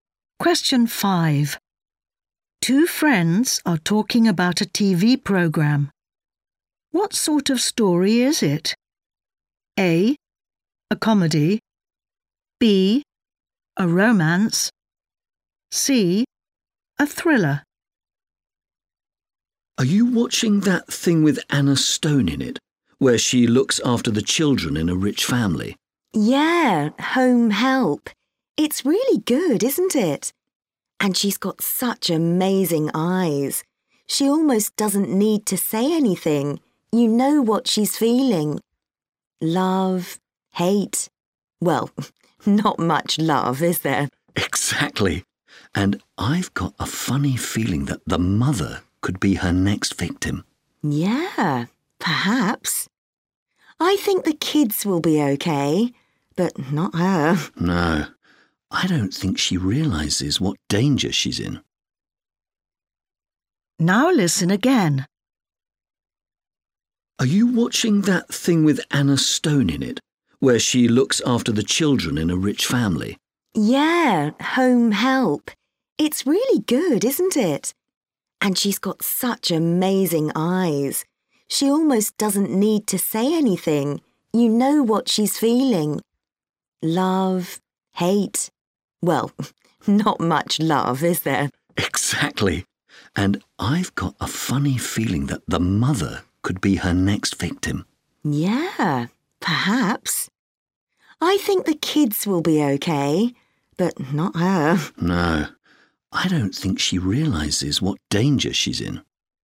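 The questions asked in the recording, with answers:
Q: What sort of story is it?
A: C: A thriller.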